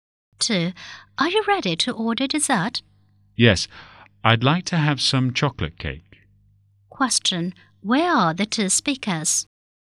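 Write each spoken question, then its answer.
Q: Where are the 2 speakers?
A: In a restaurant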